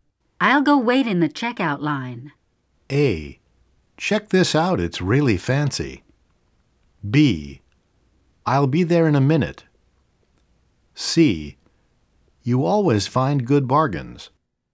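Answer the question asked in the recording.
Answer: B: I'll be there in a minute.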